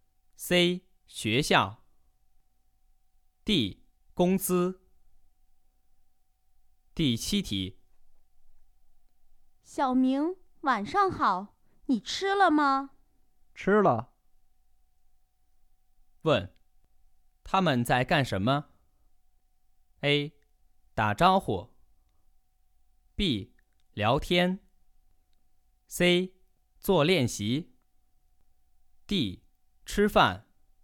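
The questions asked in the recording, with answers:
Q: 问,他们在干什么?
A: A: 打招呼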